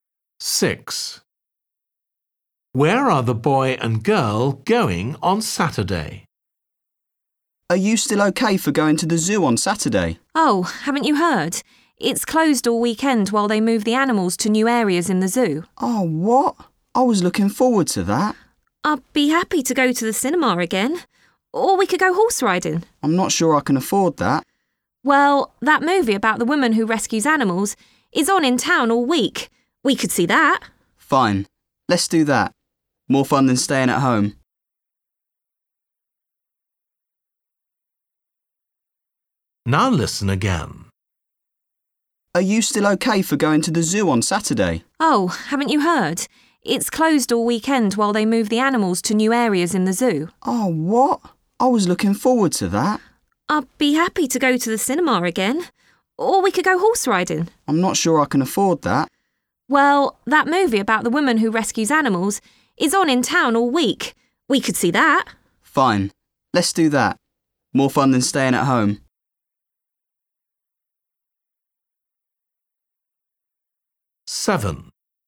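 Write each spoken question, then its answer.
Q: Where are the boy and girl going on Saturday?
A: to the cinema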